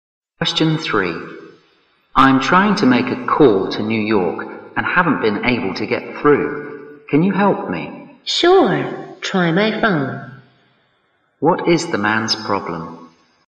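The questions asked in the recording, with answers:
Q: What is the man's problem?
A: He can't get through on a call to New York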